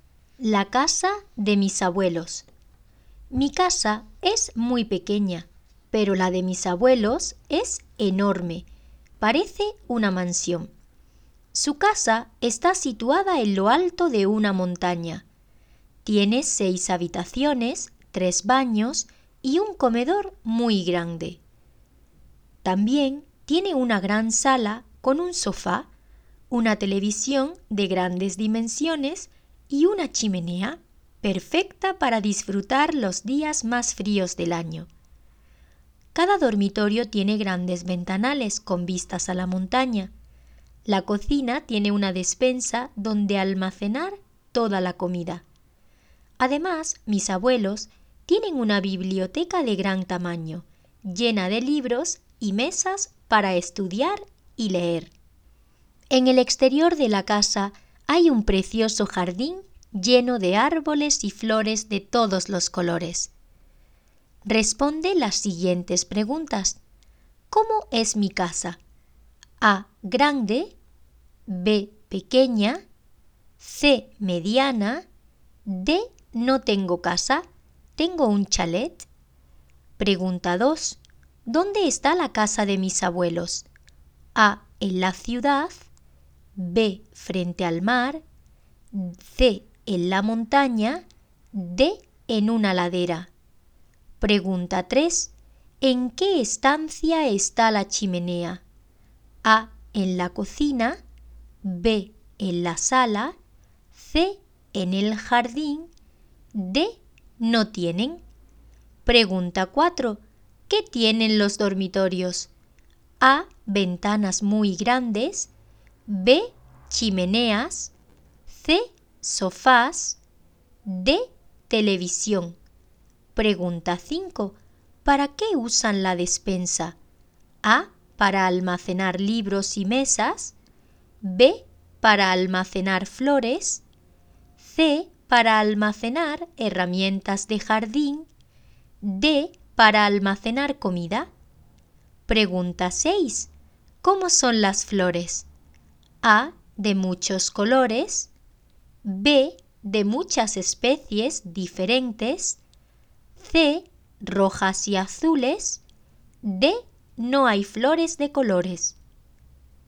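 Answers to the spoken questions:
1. B: Pequeña.
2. C: En la montaña.
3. B: En la sala.
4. A: Ventanas muy grandes.
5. D: Para almacenar comida.
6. A: De muchos colores.

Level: Basis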